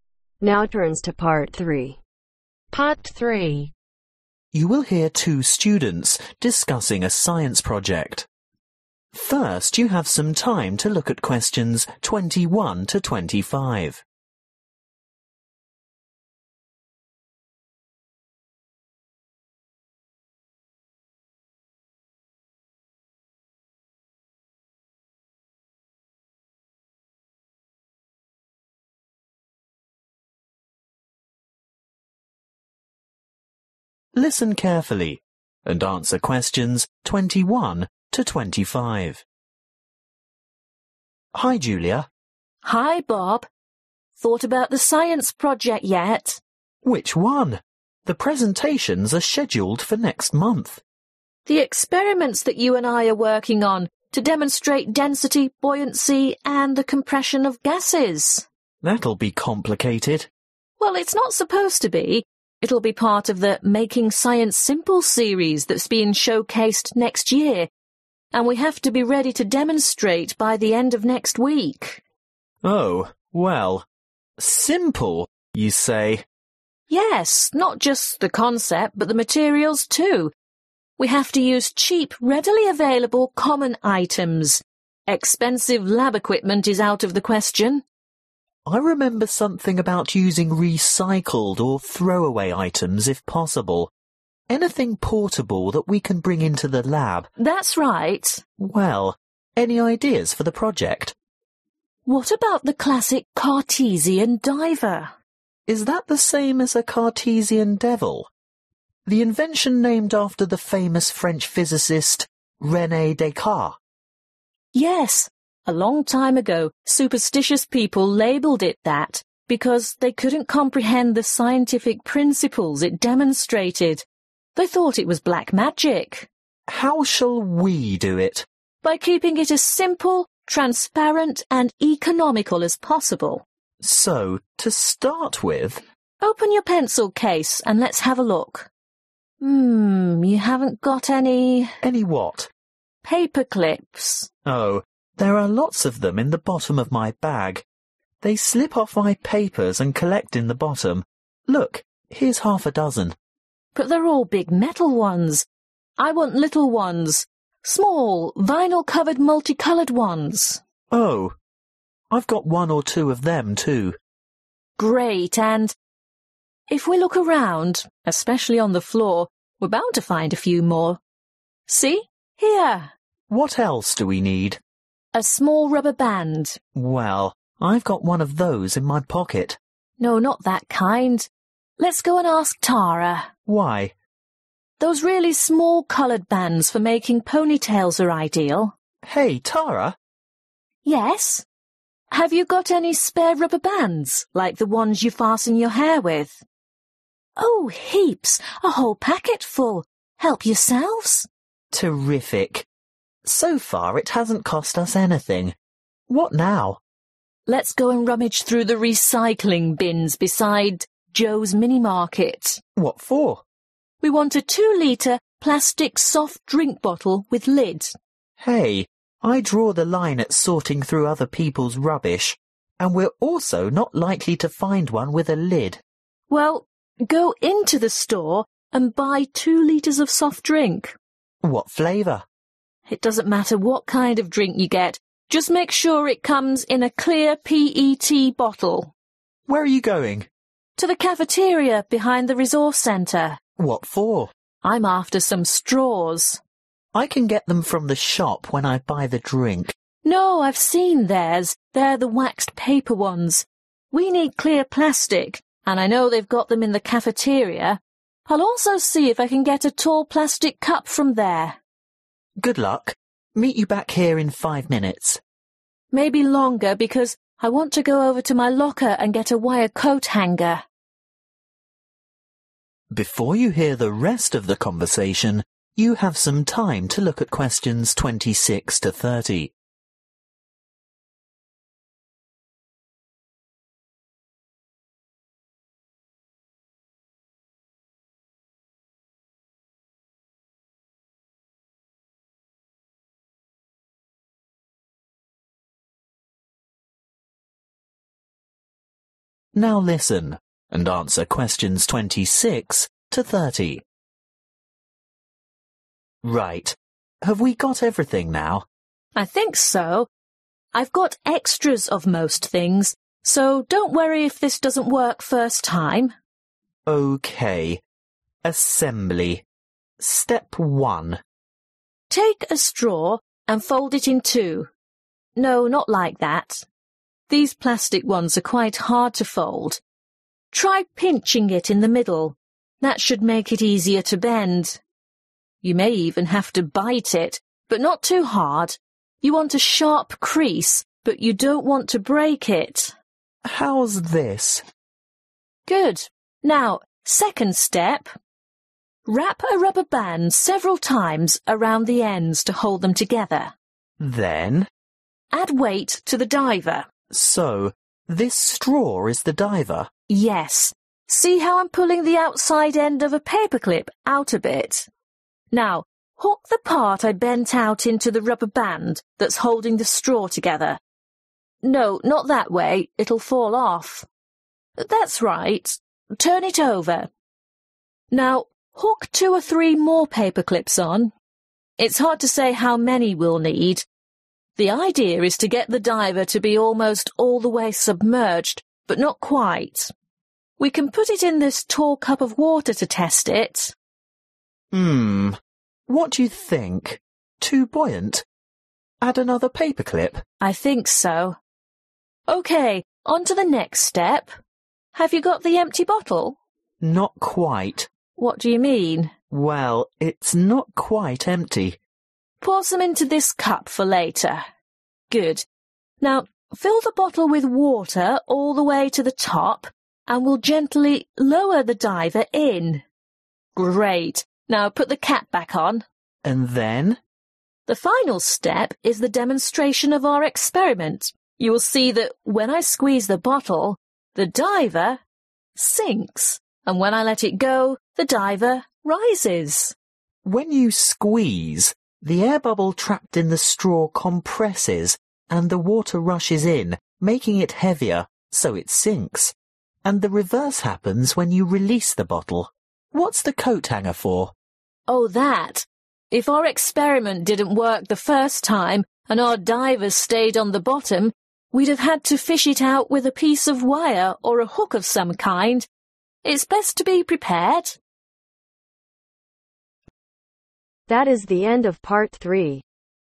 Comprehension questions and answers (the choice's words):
Choose the correct letter , A , B or C.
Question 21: Julia and Bob's science project is due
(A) next week.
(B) next month.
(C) next year.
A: next week.

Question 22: All the materials they use must be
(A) recycled.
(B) inexpensive.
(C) available in the lab.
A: inexpensive.

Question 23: A Cartesian diver was called a 'devil' by some people because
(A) they saw it was black.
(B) they believed in the supernatural.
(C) they wanted the inventor to be famous.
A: they believed in the supernatural.

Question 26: Fold (26) .............. in half.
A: straw

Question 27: Use (27) ............... to secure the ends.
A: rubber band

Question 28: Attach (28) ............... to diver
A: paper clips

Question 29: Fill bottle with water and replace (29) ................. .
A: cap / lid

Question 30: Demonstrate by squeezing and releasing bottle. compression causes diver ti sink because diver becomes (30) .................. .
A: heavier